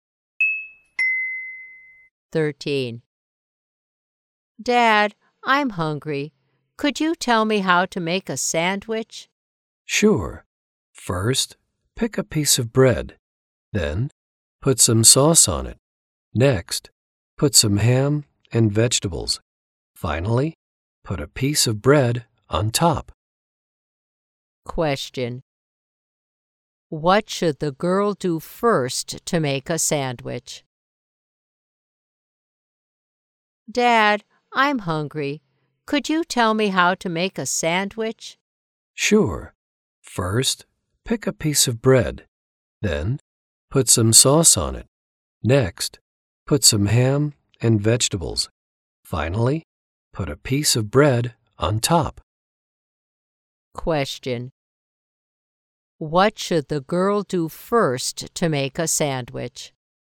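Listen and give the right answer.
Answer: Pick a piece of bread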